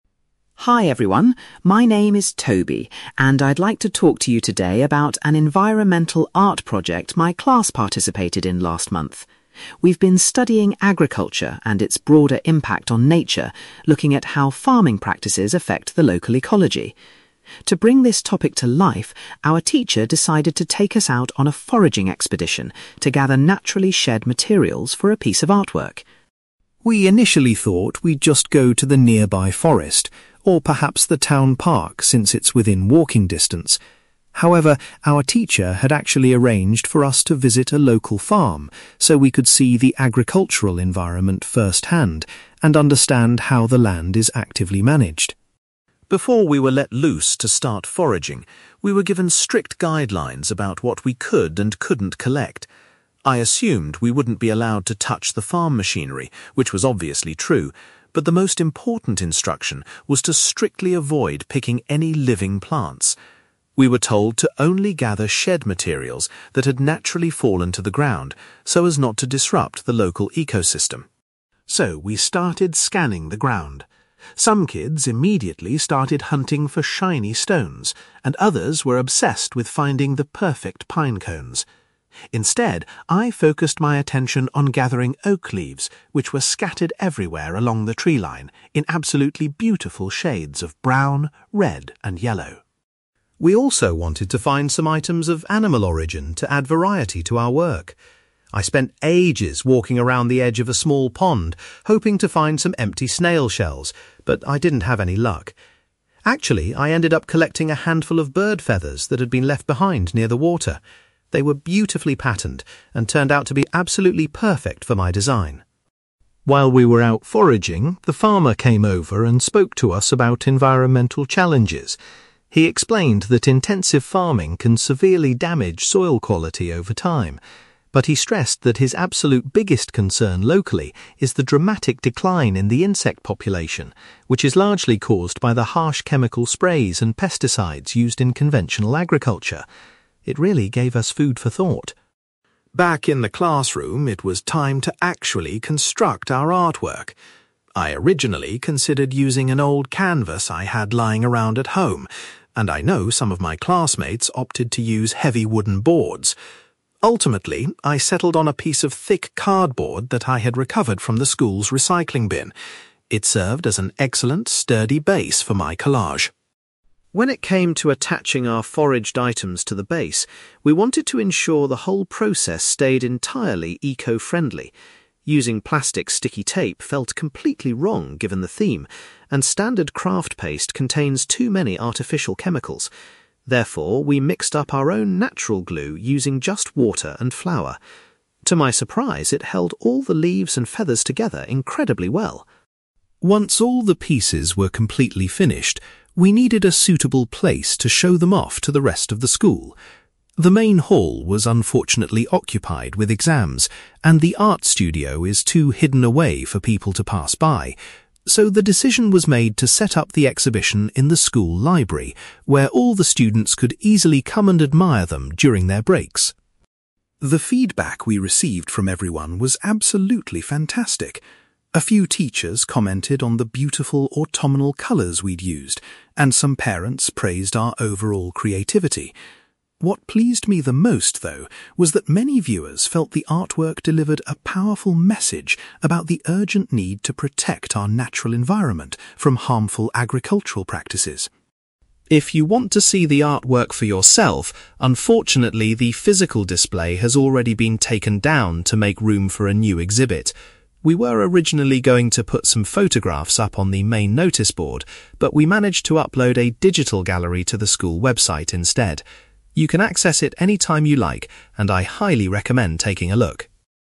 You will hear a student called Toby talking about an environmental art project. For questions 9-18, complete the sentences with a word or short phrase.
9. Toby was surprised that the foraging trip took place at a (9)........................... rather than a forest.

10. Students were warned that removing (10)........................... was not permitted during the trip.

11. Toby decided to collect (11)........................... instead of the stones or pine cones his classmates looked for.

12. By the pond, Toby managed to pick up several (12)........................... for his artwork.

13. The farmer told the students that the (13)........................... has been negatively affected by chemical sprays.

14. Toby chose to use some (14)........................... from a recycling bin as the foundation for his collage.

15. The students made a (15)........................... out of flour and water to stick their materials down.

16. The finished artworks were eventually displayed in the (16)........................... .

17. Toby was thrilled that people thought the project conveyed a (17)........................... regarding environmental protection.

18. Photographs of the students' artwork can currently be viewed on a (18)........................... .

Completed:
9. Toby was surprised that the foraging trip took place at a local farm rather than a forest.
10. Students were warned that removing living plants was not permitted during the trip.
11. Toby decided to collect oak leaves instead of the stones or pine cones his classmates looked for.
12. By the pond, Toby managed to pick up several bird feathers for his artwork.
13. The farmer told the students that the insect population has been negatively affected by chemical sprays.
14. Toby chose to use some thick cardboard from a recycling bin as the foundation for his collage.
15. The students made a natural glue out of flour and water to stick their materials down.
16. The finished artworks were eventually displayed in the school library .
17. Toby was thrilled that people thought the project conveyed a powerful message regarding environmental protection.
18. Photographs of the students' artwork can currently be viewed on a website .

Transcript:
Toby: Hi everyone, my name is Toby, and I'd like to talk to you today about an environmental art project my class participated in last month. We've been studying agriculture and its broader impact on nature, looking at how farming practices affect the local ecology. To bring this topic to life, our teacher decided to take us out on a foraging expedition to gather naturally shed materials for a piece of artwork.
We initially thought we'd just go to the nearby forest, or perhaps the town park since it's within walking distance. However, our teacher had actually arranged for us to visit a local farm so we could see the agricultural environment first-hand and understand how the land is actively managed.
Before we were let loose to start foraging, we were given strict guidelines about what we could and couldn't collect. I assumed we wouldn't be allowed to touch the farm machinery, which was obviously true, but the most important instruction was to strictly avoid picking any living plants. We were told to only gather shed materials that had naturally fallen to the ground, so as not to disrupt the local ecosystem.
So, we started scanning the ground. Some kids immediately started hunting for shiny stones, and others were obsessed with finding the perfect pine cones. Instead, I focused my attention on gathering oak leaves, which were scattered everywhere along the tree line in absolutely beautiful shades of brown, red, and yellow.
We also wanted to find some items of animal origin to add variety to our work. I spent ages walking around the edge of a small pond hoping to find some empty snail shells, but I didn't have any luck. Actually, I ended up collecting a handful of bird feathers that had been left behind near the water. They were beautifully patterned and turned out to be absolutely perfect for my design.
While we were out foraging, the farmer came over and spoke to us about environmental challenges. He explained that intensive farming can severely damage soil quality over time. But he stressed that his absolute biggest concern locally is the dramatic decline in the insect population, which is largely caused by the harsh chemical sprays and pesticides used in conventional agriculture. It really gave us food for thought.
Back in the classroom, it was time to actually construct our artwork. I originally considered using an old canvas I had lying around at home, and I know some of my classmates opted to use heavy wooden boards. Ultimately, I settled on a piece of thick cardboard that I had recovered from the school's recycling bin. It served as an excellent, sturdy base for my collage.
When it came to attaching our foraged items to the base, we wanted to ensure the whole process stayed entirely eco-friendly. Using plastic sticky tape felt completely wrong given the theme, and standard craft paste contains too many artificial chemicals. Therefore, we mixed up our own natural glue using just water and flour. To my surprise, it held all the leaves and feathers together incredibly well.
Once all the pieces were completely finished, we needed a suitable place to show them off to the rest of the school. The main hall was unfortunately occupied with exams, and the art studio is too hidden away for people to pass by. So, the decision was made to set up the exhibition in the school library, where all the students could easily come and admire them during their breaks.
The feedback we received from everyone was absolutely fantastic. A few teachers commented on the beautiful autumnal colours we'd used, and some parents praised our overall creativity. What pleased me the most, though, was that many viewers felt the artwork delivered a powerful message about the urgent need to protect our natural environment from harmful agricultural practices.
If you want to see the artwork for yourself, unfortunately, the physical display has already been taken down to make room for a new exhibit. We were originally going to put some photographs up on the main noticeboard, but we managed to upload a digital gallery to the school website instead. You can access it anytime you like, and I highly recommend taking a look!

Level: B2